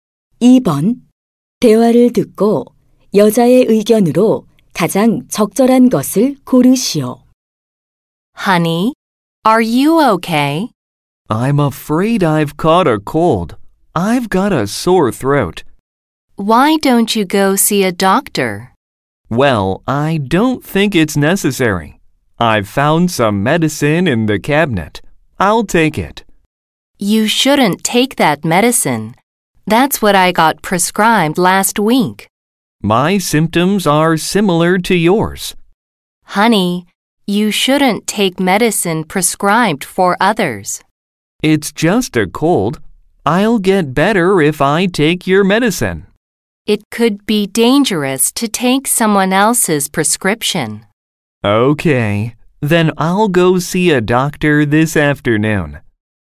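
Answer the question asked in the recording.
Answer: 다른 사람에게 처방된 약을 복용하면 안 된다.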